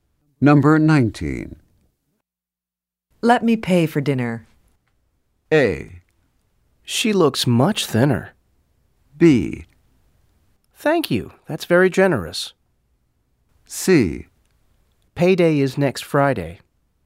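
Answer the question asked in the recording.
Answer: B: Thank you. That's very generous.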